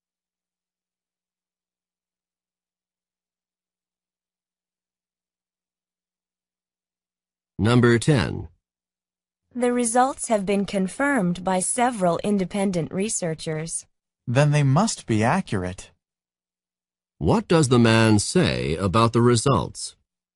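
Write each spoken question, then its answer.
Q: What does the man say about the results?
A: They must be accurate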